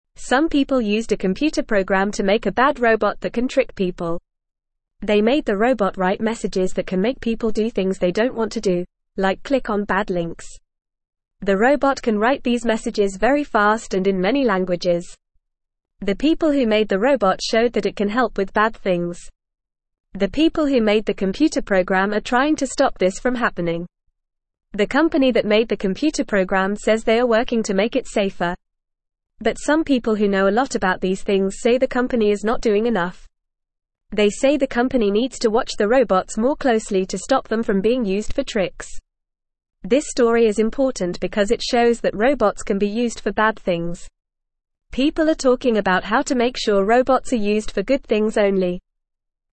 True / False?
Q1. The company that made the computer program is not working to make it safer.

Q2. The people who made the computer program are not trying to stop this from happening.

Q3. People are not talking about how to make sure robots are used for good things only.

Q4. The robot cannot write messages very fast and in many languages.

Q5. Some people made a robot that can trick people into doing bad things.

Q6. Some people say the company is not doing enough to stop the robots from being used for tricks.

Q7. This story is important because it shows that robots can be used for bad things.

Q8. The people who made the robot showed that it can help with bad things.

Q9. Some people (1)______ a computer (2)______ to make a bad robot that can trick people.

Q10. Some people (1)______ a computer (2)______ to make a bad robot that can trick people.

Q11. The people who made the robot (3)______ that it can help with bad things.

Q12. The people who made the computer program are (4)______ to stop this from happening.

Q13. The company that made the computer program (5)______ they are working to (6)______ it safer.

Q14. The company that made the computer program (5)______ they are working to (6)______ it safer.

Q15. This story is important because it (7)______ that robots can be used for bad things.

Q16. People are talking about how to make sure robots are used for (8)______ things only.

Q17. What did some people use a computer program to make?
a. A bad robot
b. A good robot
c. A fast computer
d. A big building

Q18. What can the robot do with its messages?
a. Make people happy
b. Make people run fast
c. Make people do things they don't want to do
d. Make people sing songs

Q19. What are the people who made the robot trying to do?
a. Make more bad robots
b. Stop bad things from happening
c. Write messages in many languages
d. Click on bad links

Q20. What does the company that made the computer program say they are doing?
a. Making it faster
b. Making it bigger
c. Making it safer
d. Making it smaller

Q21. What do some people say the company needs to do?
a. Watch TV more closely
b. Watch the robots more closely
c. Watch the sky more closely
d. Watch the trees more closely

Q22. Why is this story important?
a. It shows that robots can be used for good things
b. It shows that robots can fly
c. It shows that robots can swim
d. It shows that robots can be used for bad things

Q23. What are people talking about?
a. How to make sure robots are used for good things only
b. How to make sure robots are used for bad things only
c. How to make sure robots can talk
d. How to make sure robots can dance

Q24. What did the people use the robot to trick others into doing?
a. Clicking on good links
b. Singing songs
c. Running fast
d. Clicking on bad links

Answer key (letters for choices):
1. False
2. False
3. False
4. False
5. True
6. True
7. True
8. True
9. used
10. program
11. showed
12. trying
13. says
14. make
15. shows
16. good
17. a
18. c
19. b
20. c
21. b
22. d
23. a
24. d

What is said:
Some people used a computer program to make a bad robot that can trick people. They made the robot write messages that can make people do things they don't want to do, like click on bad links. The robot can write these messages very fast and in many languages. The people who made the computer program are trying to stop this from happening.
The company that made the computer program says they are working to make it safer. But some people who know a lot about these things say the company is not doing enough. They say the company needs to watch the robots more closely to stop them from being used for tricks. People are talking about how to make sure robots are used for good things only.

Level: Level 1